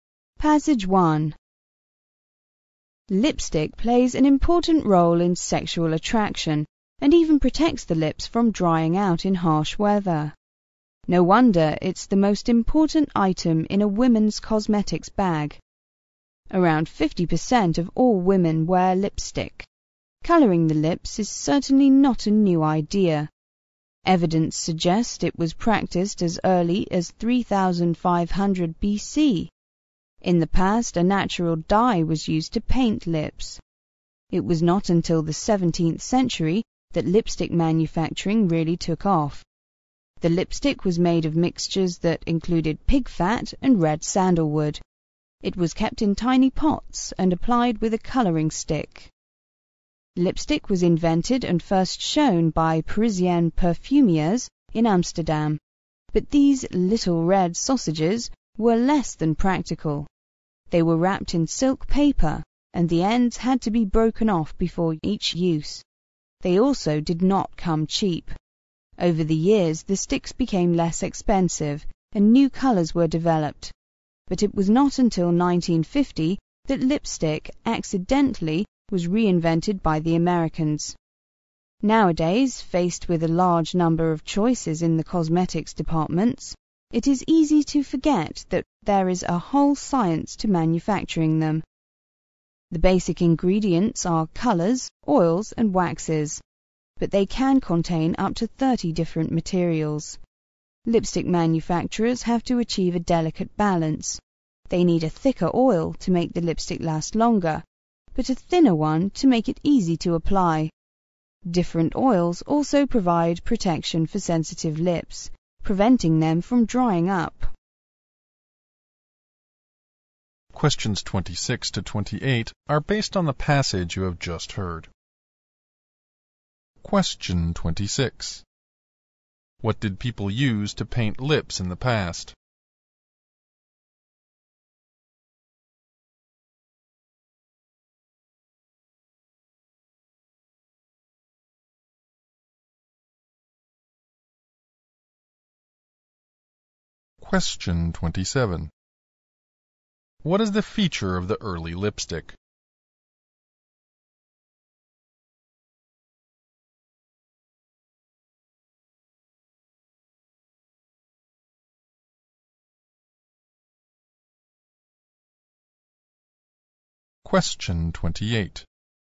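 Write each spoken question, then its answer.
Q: What did people use to paint lips in the past?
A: A natural dye

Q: What ingredient in lipstick can make it last longer?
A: A thicker oil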